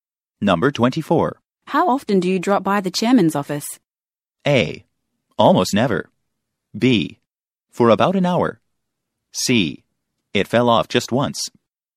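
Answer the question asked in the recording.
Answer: A: Almost never.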